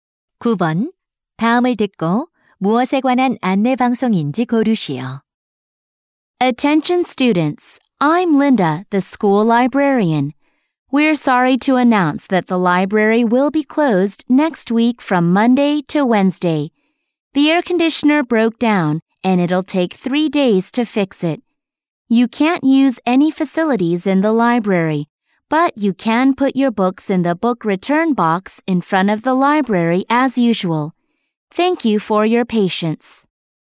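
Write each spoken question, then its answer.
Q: 다음을 듣고 무엇에 관한 안내 방송인지 고르시오.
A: 도서관 임시 휴관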